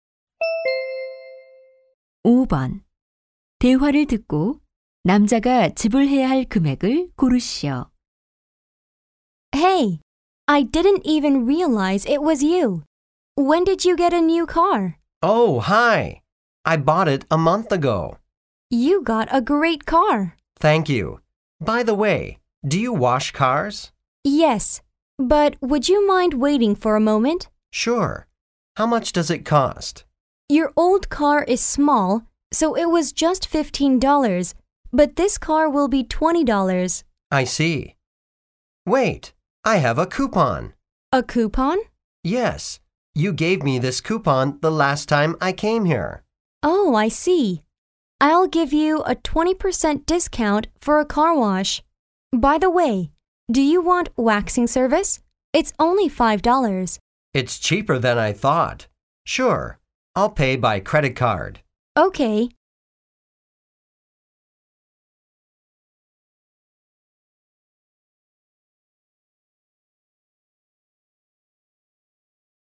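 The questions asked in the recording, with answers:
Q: 대화를 듣고 남자가 지불해야 할 금액을 고르시오.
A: $21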